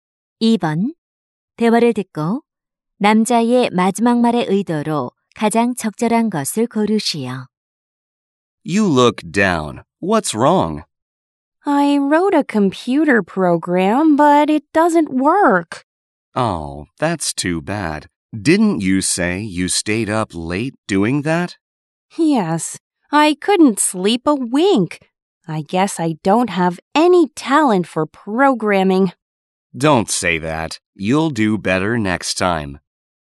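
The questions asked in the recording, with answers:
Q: 대화를 듣고 남자의 마지막 말의 의도로 가장 적절한 것을 고르시오.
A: 격려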